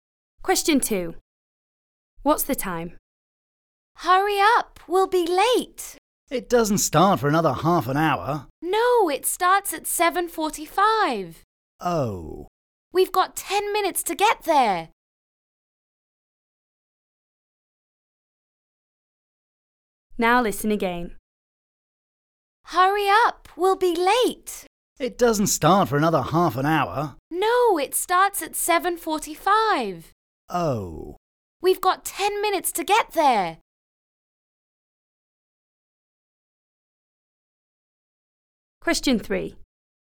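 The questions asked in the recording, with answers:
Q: What's the time?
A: 7:35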